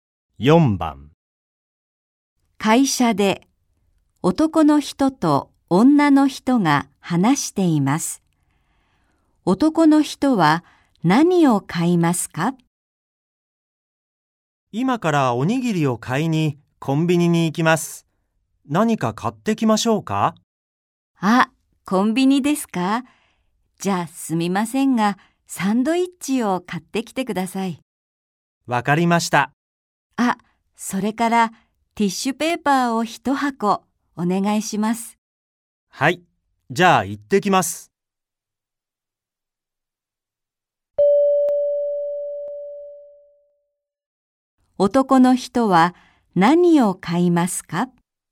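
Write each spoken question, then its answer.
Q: 男の人は何を買いますか?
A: おにぎり、サンドイッチとティッシュペーパー一箱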